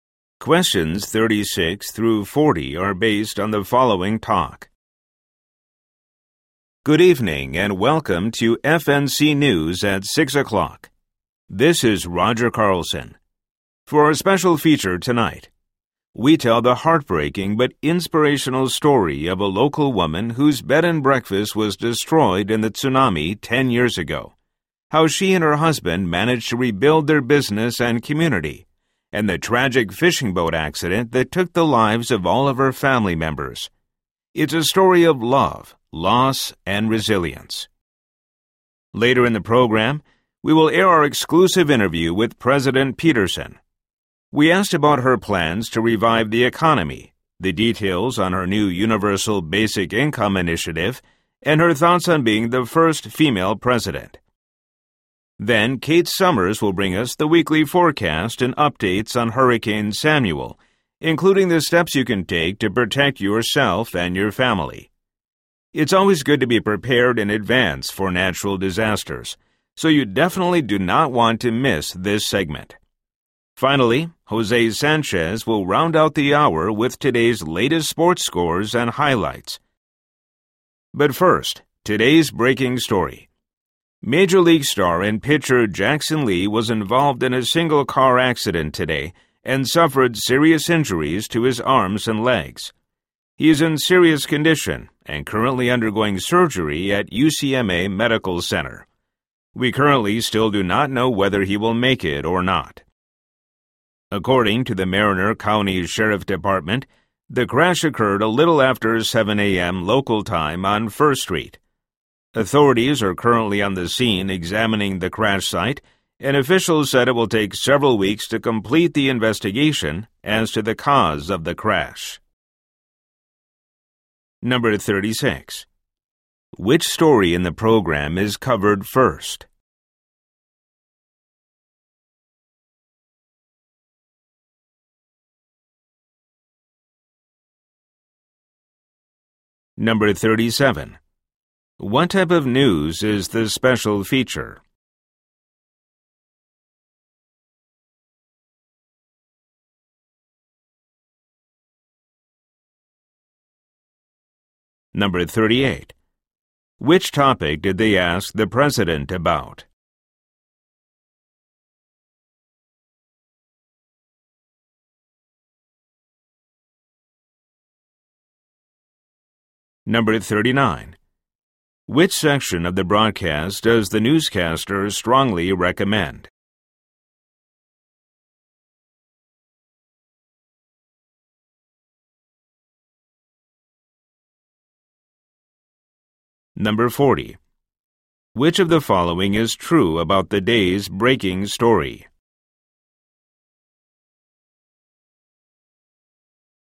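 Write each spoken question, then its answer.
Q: Which story in the program is covered first?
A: The breaking story of Jackson Lee's car accident

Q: What type of news is the special feature?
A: A human-interest story about a local woman's loss and resilience

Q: Which topic did they ask the president about?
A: Her plans to revive the economy, Universal Basic Income, being the first female president

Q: Which section of the broadcast does the newscaster strongly recommend?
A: The weather forecast and hurricane updates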